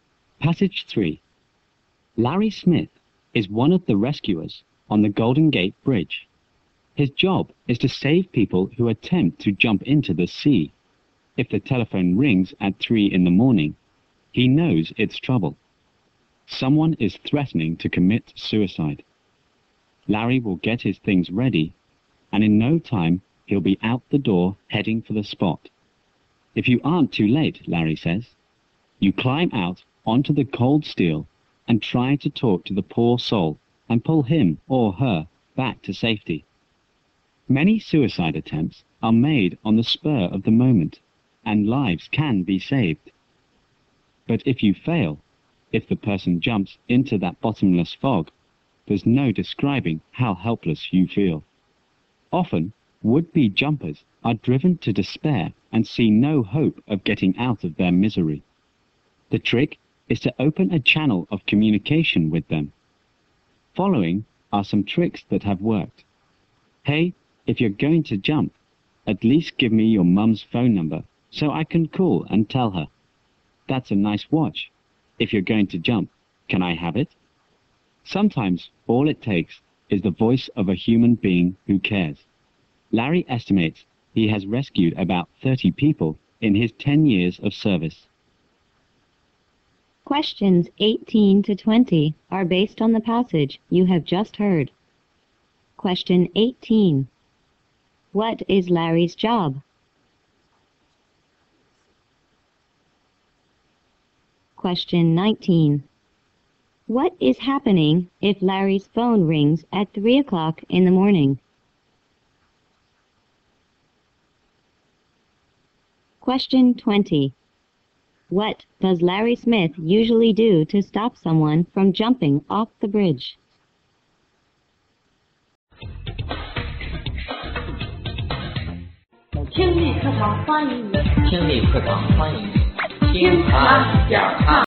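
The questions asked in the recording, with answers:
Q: What is Larry's job?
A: Rescuing people who try to jump off the Golden Gate Bridge

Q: What is happening if Larry's phone rings at 3 o'clock in the morning?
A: Someone is threatening to commit suicide

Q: What does Larry Smith usually do to stop someone from jumping off the bridge?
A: He talks to them to open communication and pulls them back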